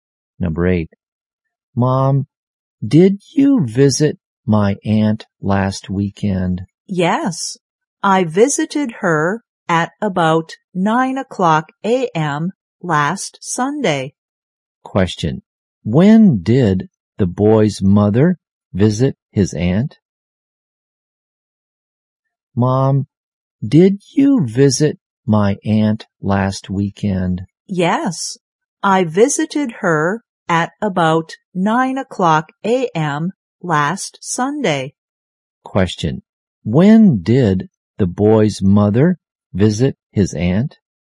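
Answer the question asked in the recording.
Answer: At about 9 a.m. last Sunday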